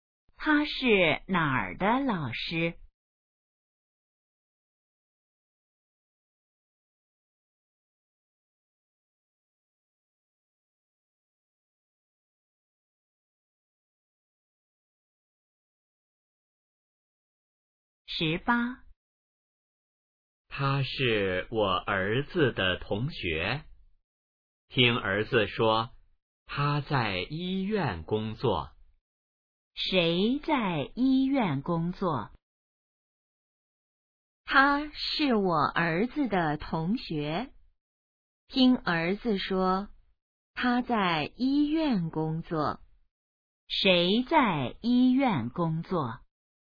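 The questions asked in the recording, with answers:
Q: 谁在医院工作?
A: 儿子的同学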